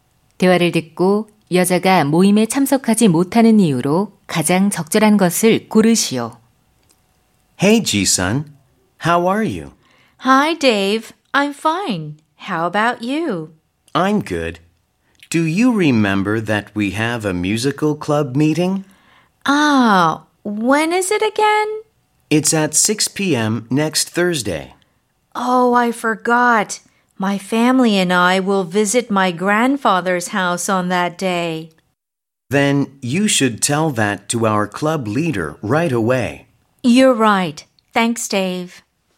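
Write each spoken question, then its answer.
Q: 대화를 듣고 여자가 모임에 참석하지 못하는 이유로 가장 적절한 것을 고르시오.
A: 가족과 할아버지 댁을 방문해야 해서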